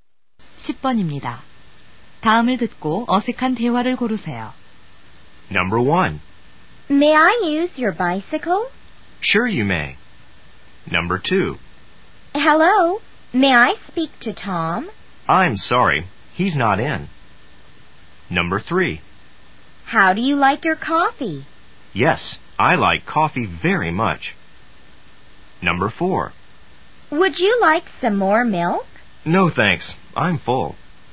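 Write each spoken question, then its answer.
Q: 다음을 듣고 어색한 대화를 고르세요.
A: 3번: How do you like your coffee? / Yes, I like coffee very much.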